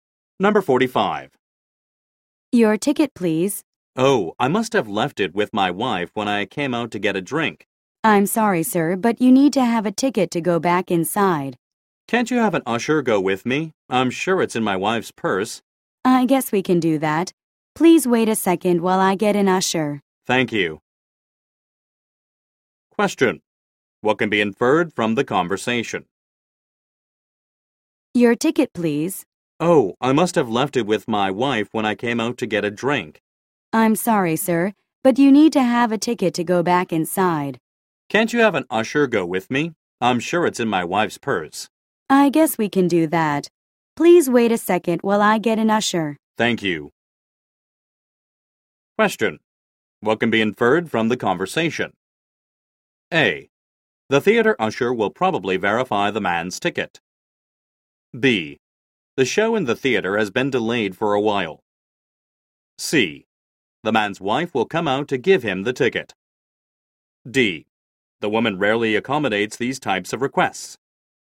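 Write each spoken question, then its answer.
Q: What can be inferred from the conversation?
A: A: The theater usher will probably verify the man's ticket.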